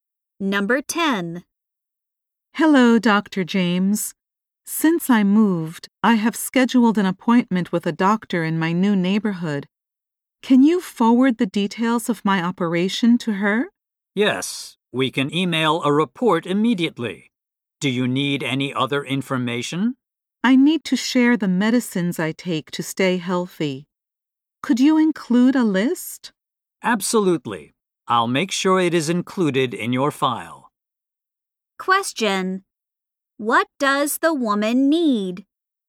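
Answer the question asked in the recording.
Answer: Her medical records and a list of her medicines sent to her new doctor.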